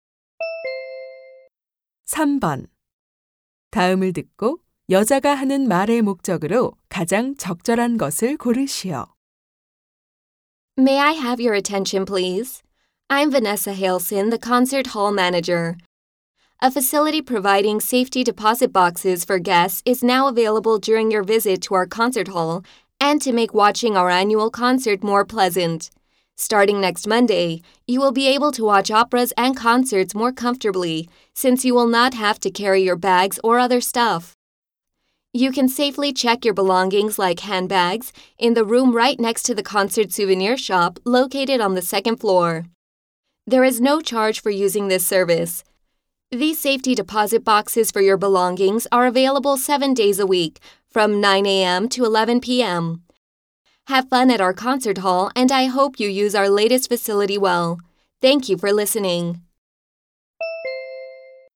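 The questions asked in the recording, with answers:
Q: 다음을 듣고 여자가 하는 말의 목적으로 가장 적절한 것을 고르시오.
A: 공연장의 새 물품 보관함 시설 이용을 안내하려고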